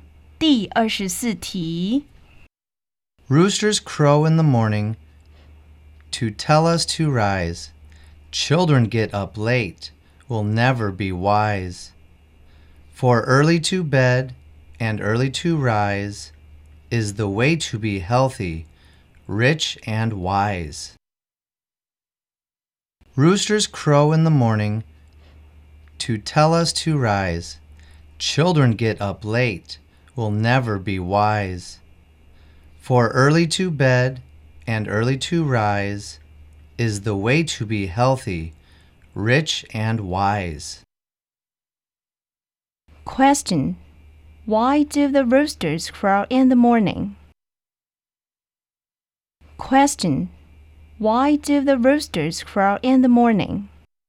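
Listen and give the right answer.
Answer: To tell us to rise.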